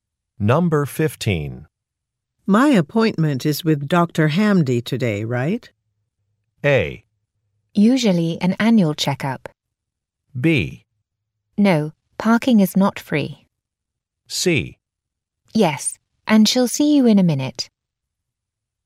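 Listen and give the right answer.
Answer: C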